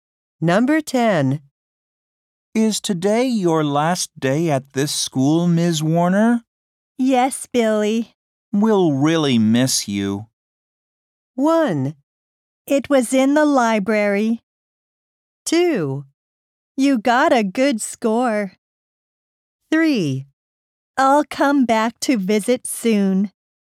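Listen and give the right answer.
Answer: 3: I'll come back to visit soon.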